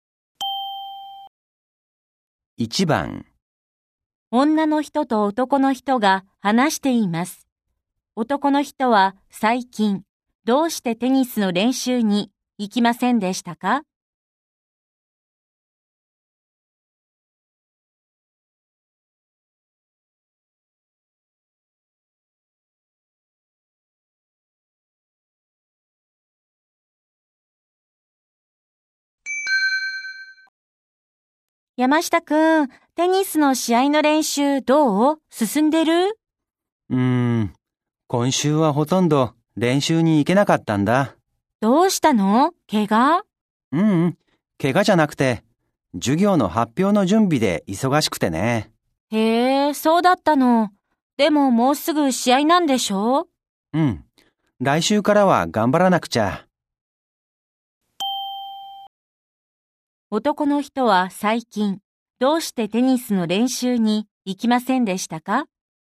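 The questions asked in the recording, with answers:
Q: 男の人は最近、どうしてテニスの練習に行きませんでしたか?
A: 授業の発表の準備で忙しかったから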